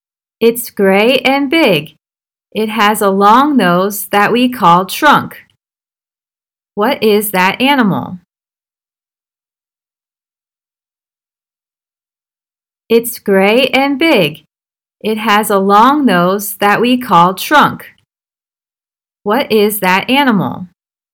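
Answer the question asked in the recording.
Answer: An elephant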